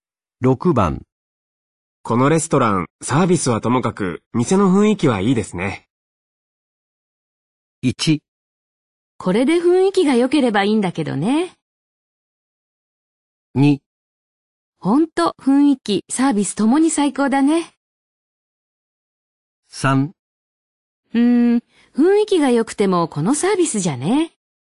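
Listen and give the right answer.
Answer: 3: 雰囲気が良くてもこのサービスじゃね。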